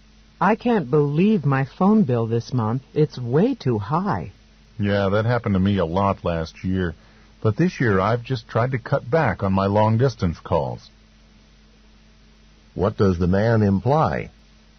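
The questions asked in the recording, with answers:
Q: What does the man imply?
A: He has reduced his phone bill by making fewer long-distance calls.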